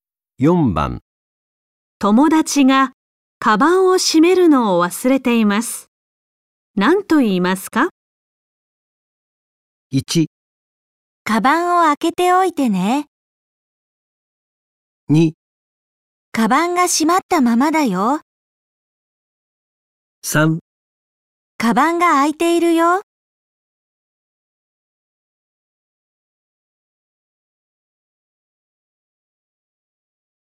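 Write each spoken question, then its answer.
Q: 友達がカバンを閉めるのを忘れています。何と言いますか?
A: 3: カバンが開いているよ。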